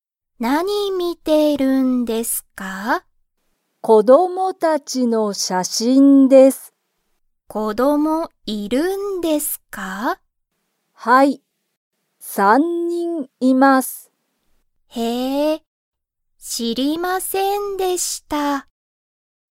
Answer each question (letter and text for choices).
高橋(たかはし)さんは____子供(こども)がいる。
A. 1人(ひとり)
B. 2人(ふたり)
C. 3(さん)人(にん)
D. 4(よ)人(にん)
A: C. 3(さん)人(にん)

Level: Level 1